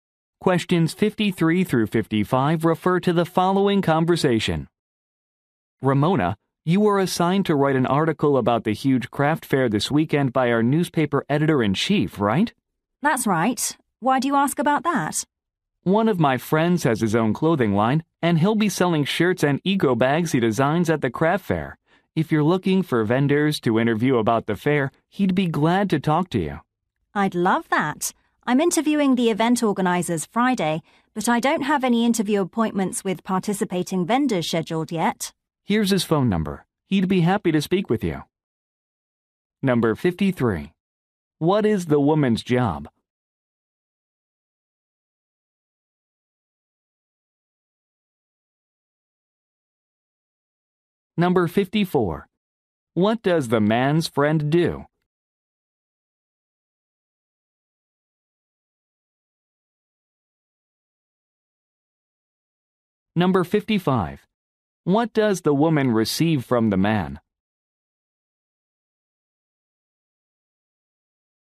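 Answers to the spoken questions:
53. Newspaper reporter
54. Designs and sells clothing
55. A phone number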